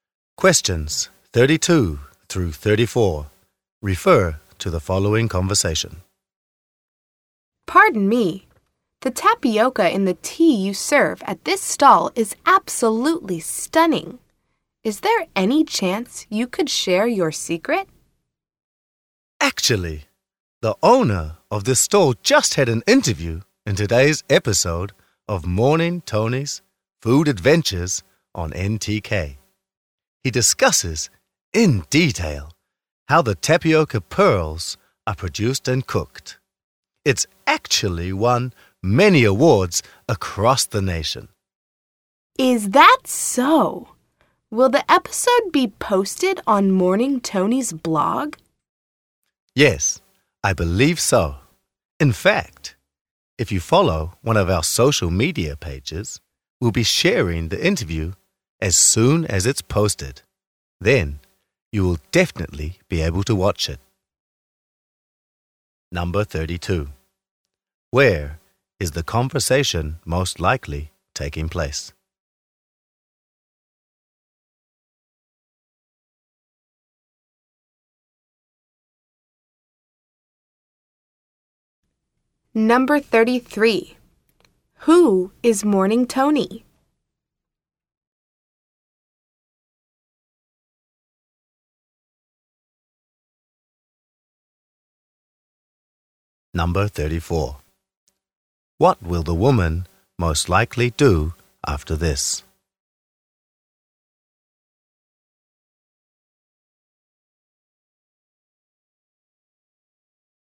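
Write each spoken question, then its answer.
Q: Where is the conversation most likely taking place?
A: At a tea stall

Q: Who is Morning Tony?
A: The host of a food show on NTK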